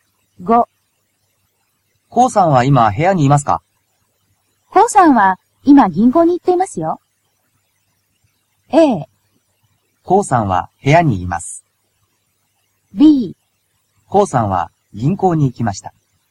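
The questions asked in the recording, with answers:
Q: コウさんは今部屋にいますか?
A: B: コウさんは銀行に行きました。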